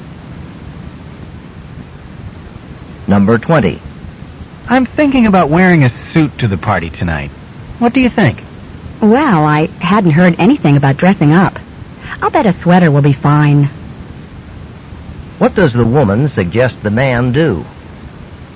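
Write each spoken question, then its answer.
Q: What does the woman suggest the man do?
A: Wear a sweater instead of a suit.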